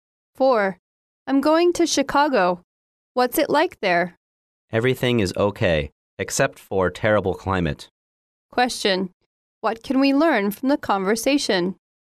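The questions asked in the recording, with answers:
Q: What can we learn from the conversation?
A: The climate in Chicago is terrible.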